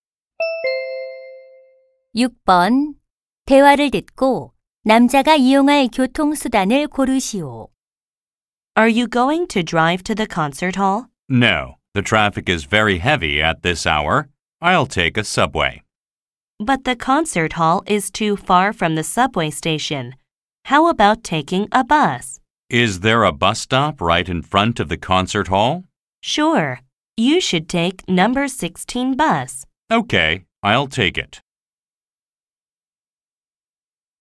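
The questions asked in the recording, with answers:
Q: 대화를 듣고 남자가 이용할 교통수단을 고르시오.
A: 버스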